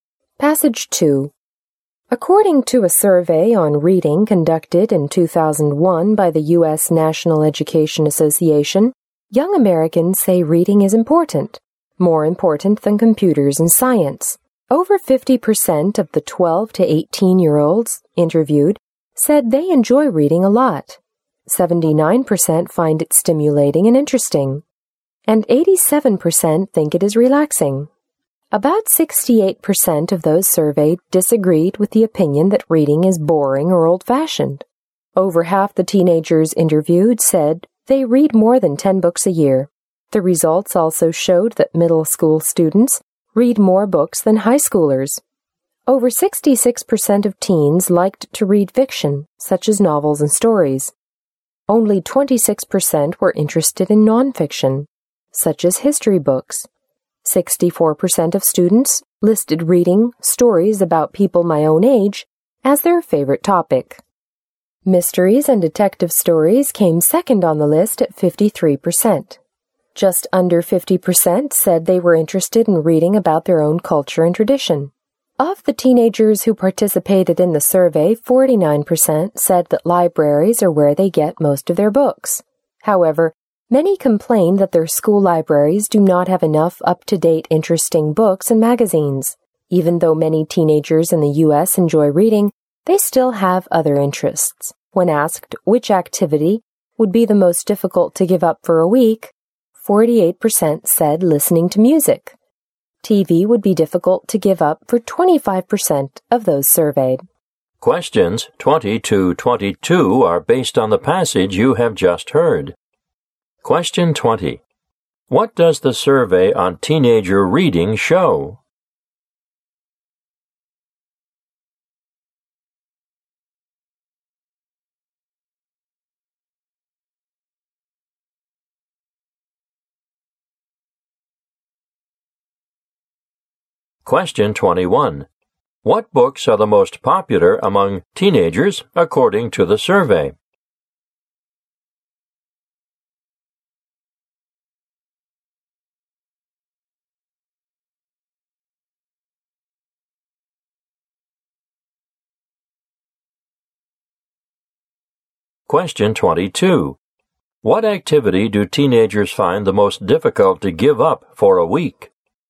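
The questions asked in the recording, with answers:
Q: What does the survey on teenager reading show?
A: Young Americans think reading is important and enjoy it.

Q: What activity do teenagers find the most difficult to give up for a week?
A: Listening to music.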